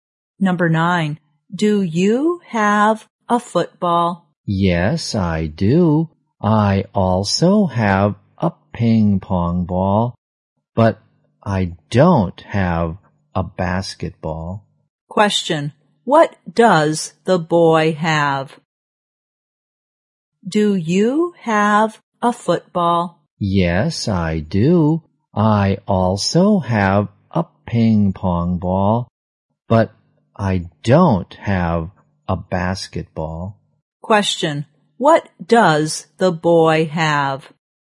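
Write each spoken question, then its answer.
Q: What does the boy have?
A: A football and a ping pong ball.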